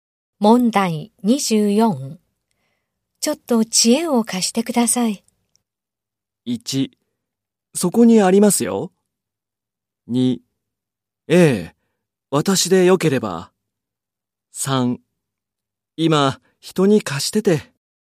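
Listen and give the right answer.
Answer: 2: ええ、私でよければ。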